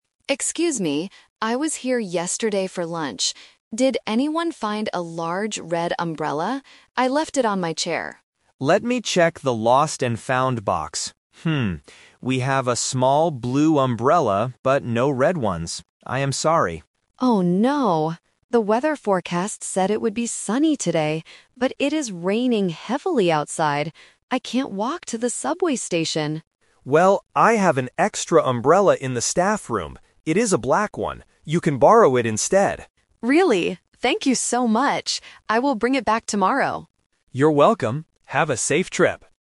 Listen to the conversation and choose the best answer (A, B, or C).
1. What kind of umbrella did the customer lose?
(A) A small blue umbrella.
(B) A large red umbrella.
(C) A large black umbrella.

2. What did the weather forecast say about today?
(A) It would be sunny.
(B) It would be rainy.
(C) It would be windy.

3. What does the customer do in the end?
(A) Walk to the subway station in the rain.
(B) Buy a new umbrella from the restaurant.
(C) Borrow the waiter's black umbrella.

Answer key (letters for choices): 1B, 2A, 3C

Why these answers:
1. The customer asks, "Did anyone find a large red umbrella?" Option (A) is a trap because the small blue umbrella is the one the waiter finds in the box. Option (C) is a trap because the black umbrella is the one the waiter lends to the customer at the end.
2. The customer clearly says, "The weather forecast said it would be sunny today...". Option (B) is the trap because heavy rain is the actual weather happening right now, not what the forecast predicted. Option (C) is never mentioned.
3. The waiter offers, "You can borrow it instead" (referring to his black umbrella), and the customer accepts by saying "Thank you so much!". Option (A) is a trap because the customer explicitly states, "I can't walk to the subway station!" in the rain. Option (B) is a plausible action but is not mentioned in the audio.

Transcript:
Customer: Excuse me. I was here yesterday for lunch. Did anyone find a large red umbrella? I left it on my chair.
Waiter: Let me check the lost and found box. we have a small blue umbrella, but no red ones. I am sorry.
Customer: Oh no. The weather forecast said it would be sunny today, but it is raining heavily outside. I can't walk to the subway station!
Waiter: Well, I have an extra umbrella in the staff room. It is a black one. You can borrow it instead.
Customer: Really? Thank you so much! I will bring it back tomorrow.